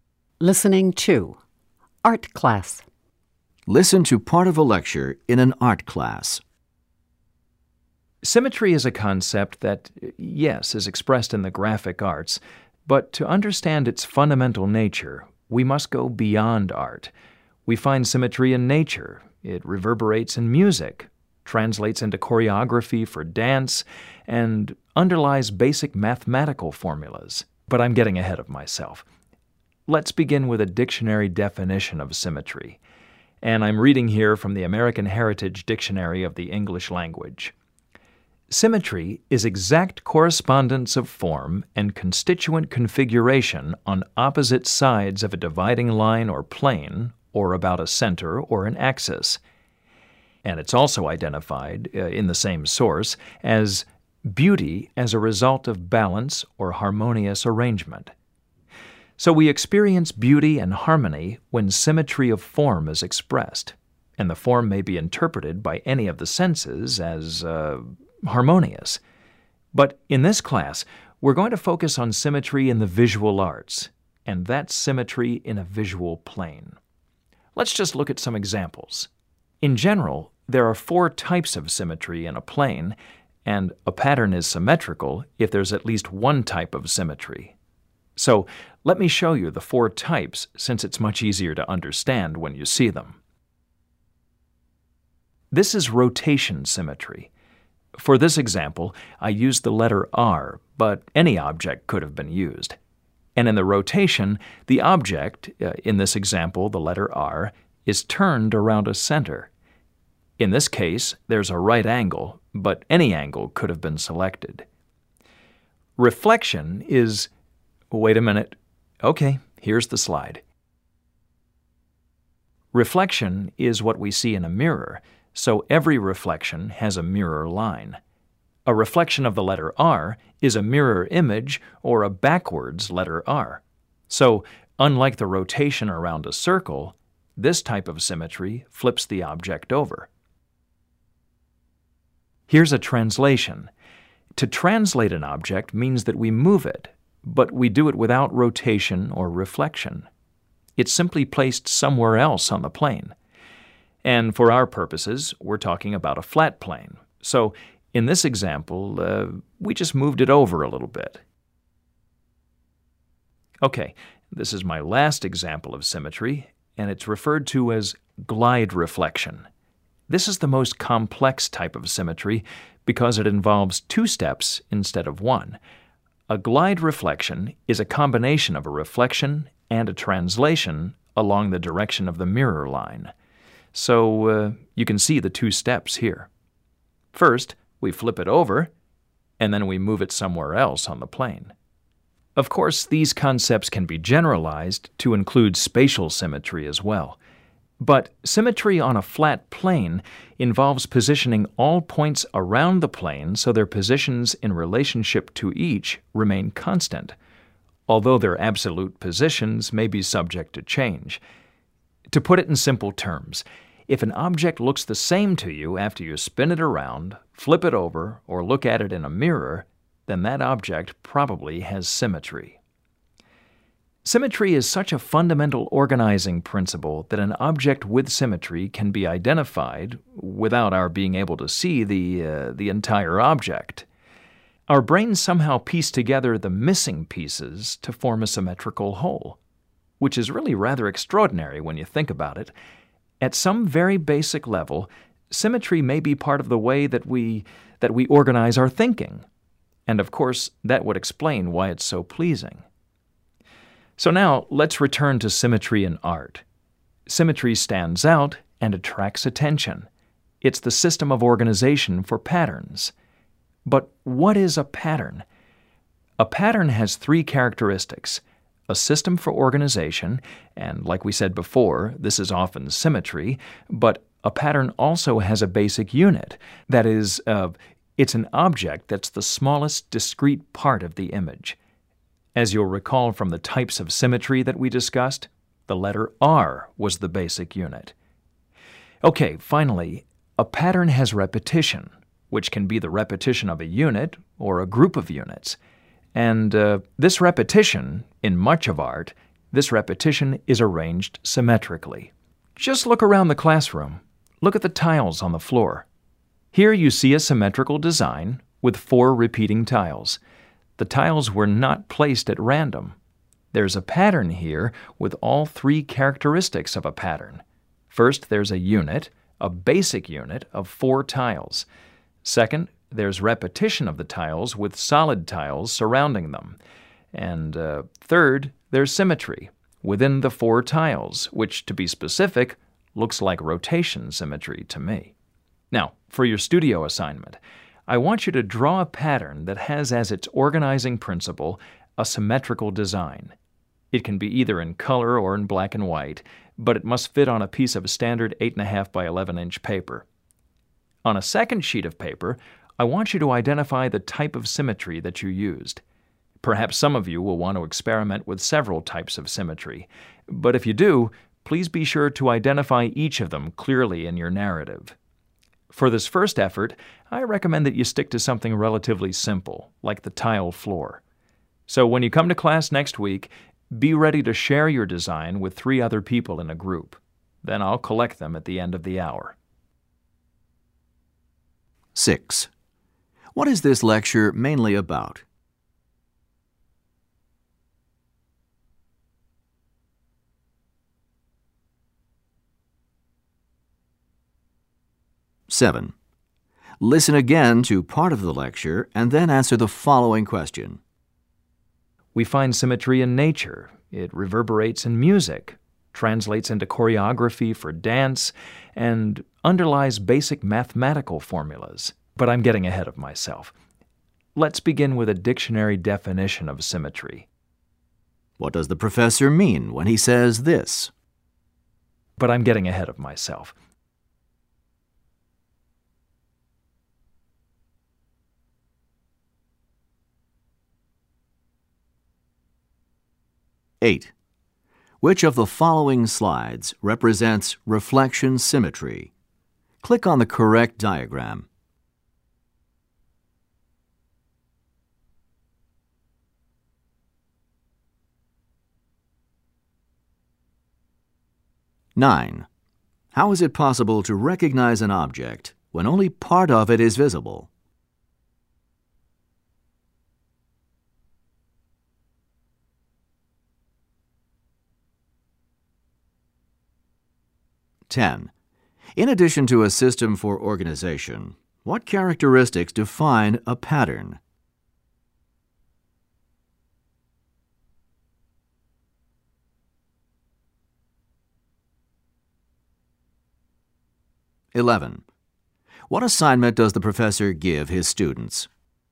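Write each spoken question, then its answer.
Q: What is this lecture mainly about?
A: Symmetry in the visual arts and patterns

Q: How is it possible to recognize an object when only part of it is visible?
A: The brain pieces together the missing parts to form a symmetrical whole

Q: In addition to a system for organization, what characteristics define a pattern?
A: A basic unit and repetition

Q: What assignment does the professor give his students?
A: Draw a symmetrical pattern and identify the type of symmetry used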